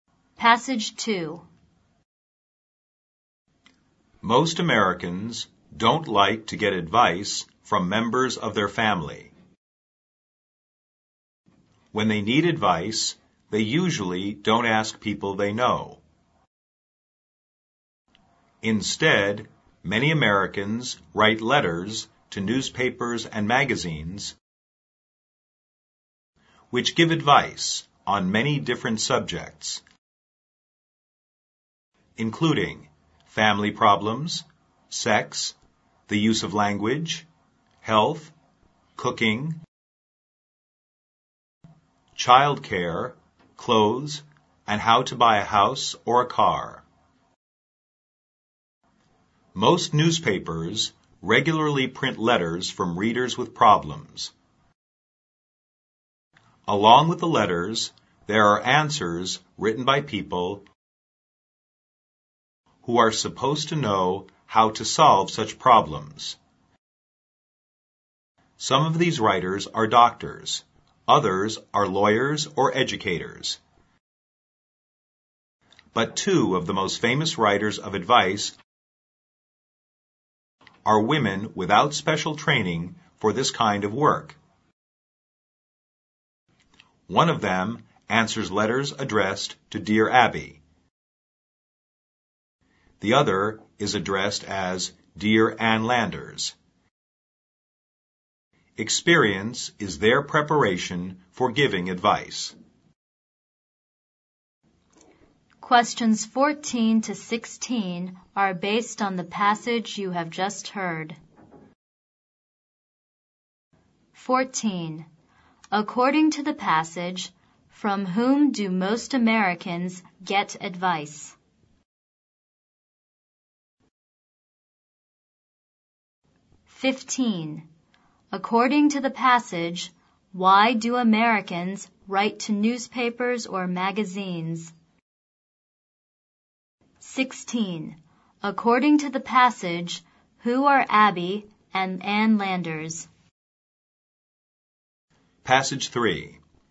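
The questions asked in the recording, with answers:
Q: According to the passage, from whom do most Americans get advice?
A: From newspapers and magazines

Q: According to the passage, why do Americans write to newspapers or magazines?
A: To get advice on their problems

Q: According to the passage, who are Abby and Ann Landers?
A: Famous advice writers without special training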